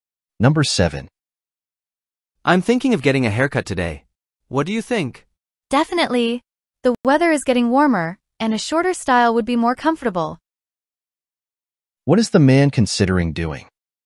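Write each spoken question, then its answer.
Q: What is the man considering doing?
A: Getting a haircut today.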